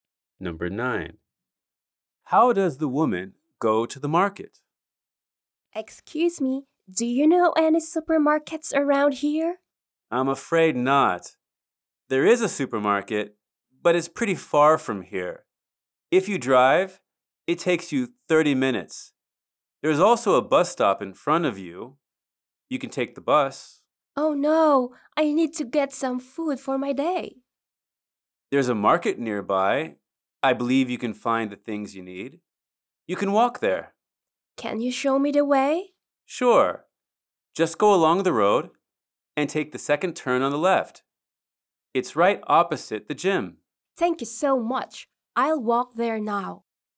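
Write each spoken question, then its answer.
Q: How does the woman go to the market?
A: She walks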